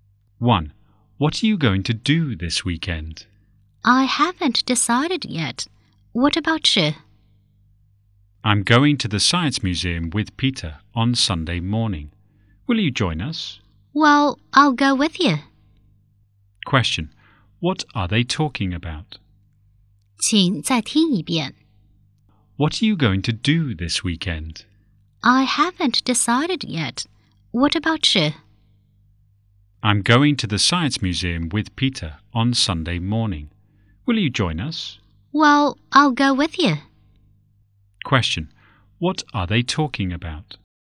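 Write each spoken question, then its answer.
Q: What are they talking about?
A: Weekend plans (going to the Science Museum)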